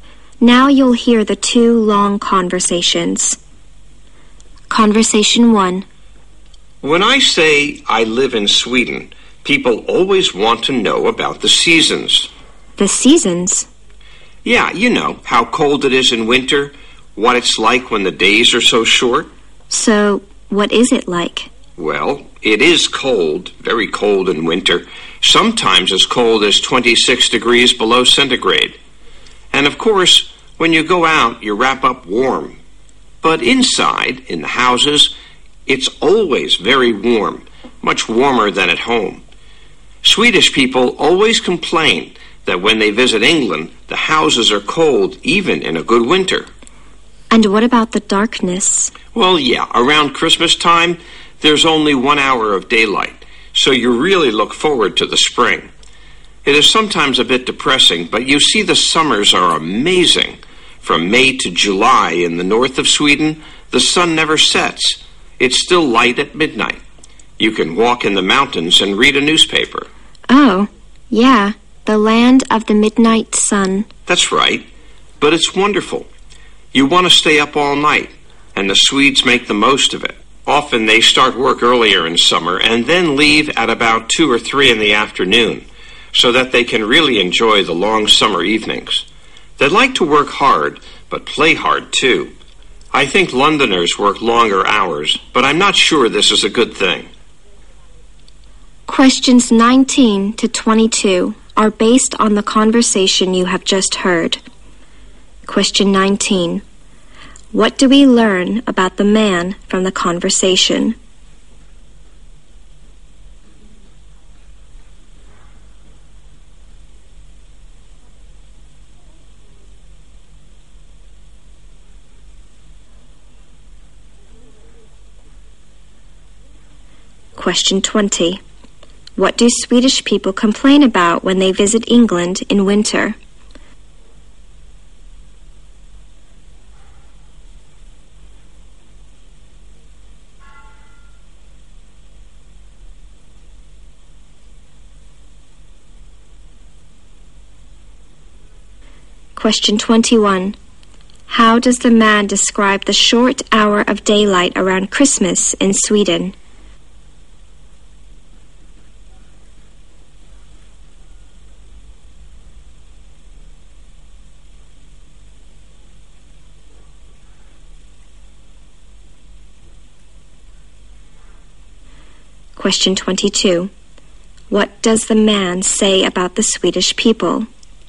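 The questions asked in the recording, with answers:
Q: What do we learn about the man from the conversation?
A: He lives in Sweden

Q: What do Swedish people complain about when they visit England in winter?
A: The houses are cold

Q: How does the man describe the short hour of daylight around Christmas in Sweden?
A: It is sometimes a bit depressing

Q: What does the man say about the Swedish people?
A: They work hard and play hard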